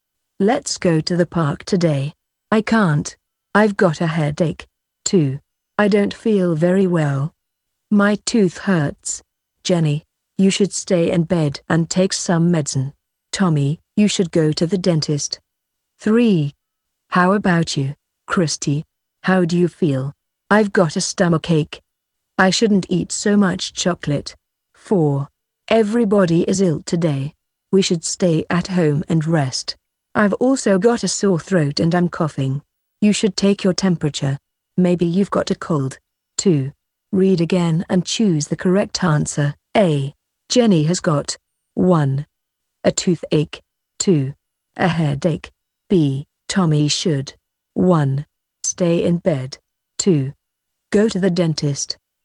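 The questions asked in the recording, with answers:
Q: Jenny has got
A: 2: A headache.

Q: Tommy should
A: 2: Go to the dentist.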